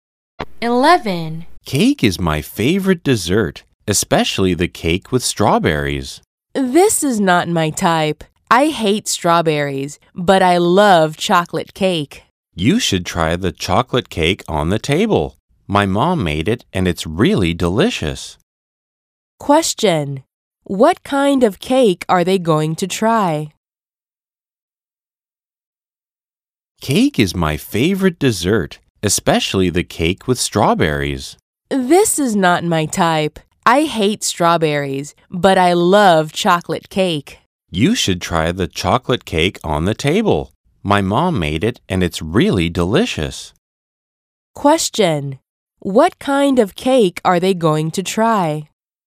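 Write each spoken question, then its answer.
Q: What kind of cake are they going to try?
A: Chocolate cake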